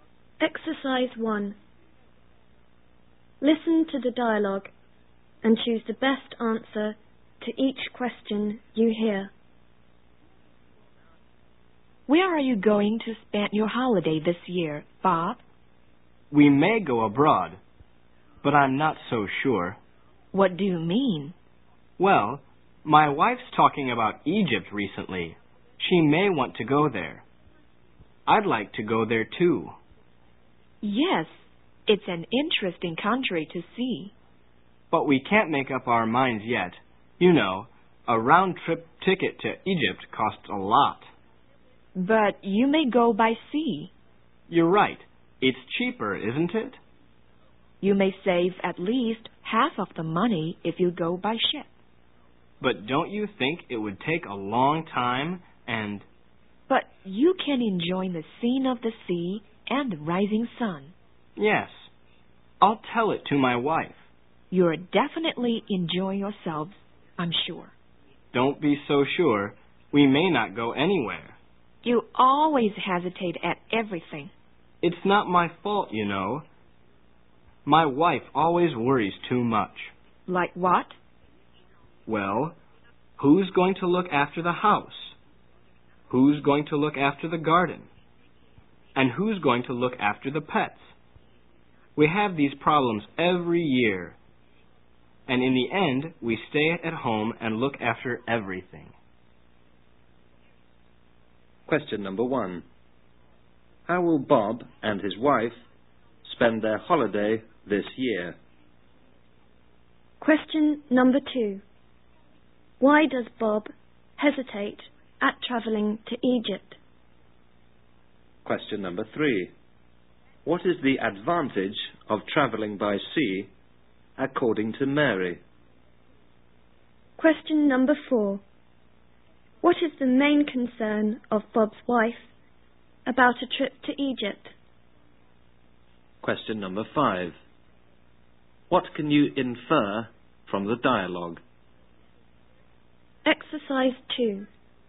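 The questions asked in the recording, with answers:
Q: Why does Bob hesitate at traveling to Egypt?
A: A round-trip ticket to Egypt costs a lot

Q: What is the advantage of traveling by sea, according to Mary?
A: It's cheaper, saving at least half the money, and you can enjoy the sea and the rising sun

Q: What is the main concern of Bob's wife about a trip to Egypt?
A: Who will look after the house, the garden and the pets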